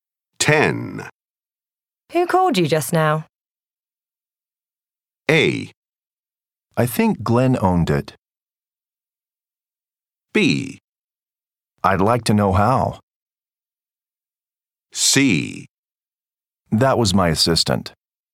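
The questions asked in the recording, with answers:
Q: Who called you just now?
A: C: That was my assistant.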